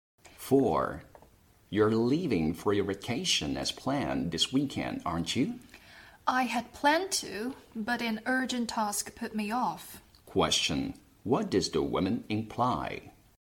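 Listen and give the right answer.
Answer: She has put off her vacation because of an urgent task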